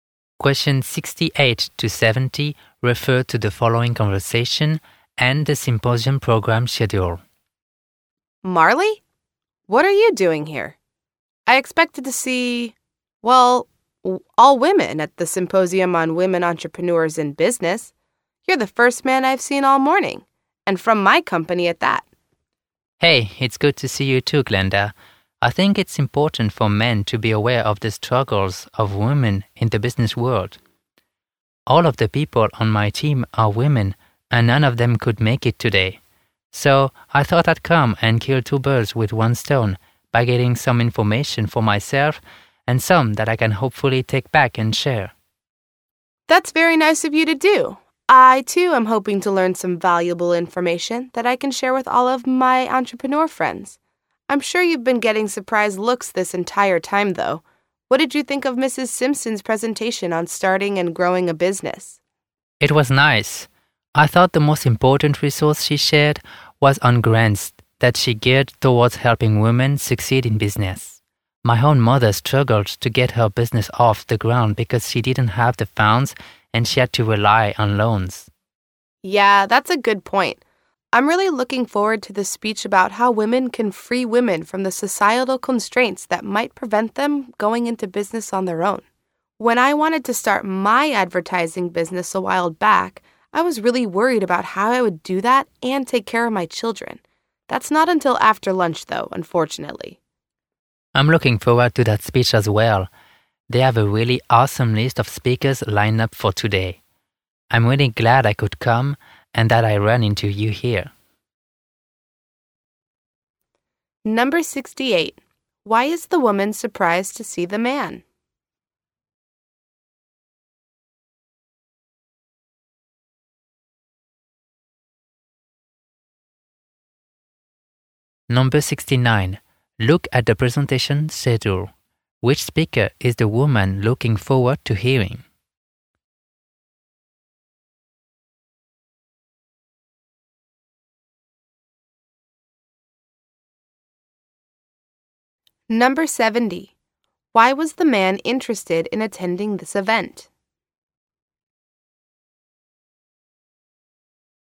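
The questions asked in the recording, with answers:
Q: Why is the woman surprised to see the man?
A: She expected only women at the symposium

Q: Why was the man interested in attending this event?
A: To learn for himself and share information with his all-female team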